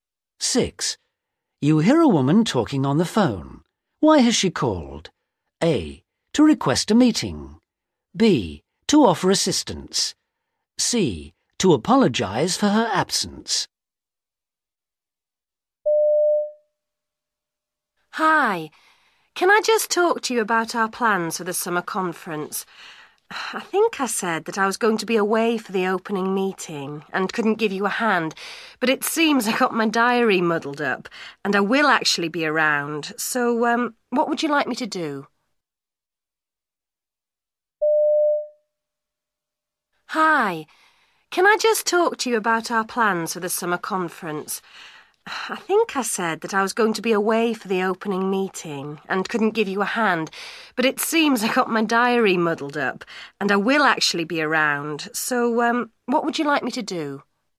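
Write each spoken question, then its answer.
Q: Why has she called?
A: B: To offer assistance.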